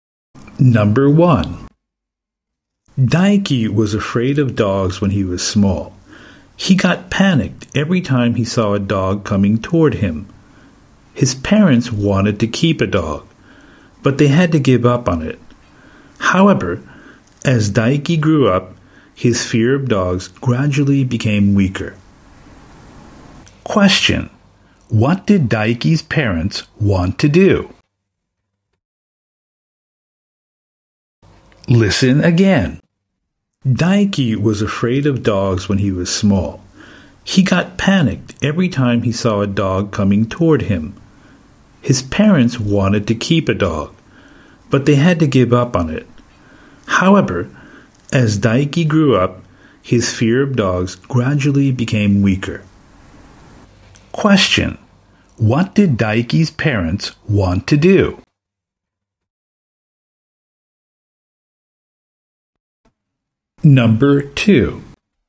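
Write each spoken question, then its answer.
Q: What did Daiki's parents want to do?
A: Keep a dog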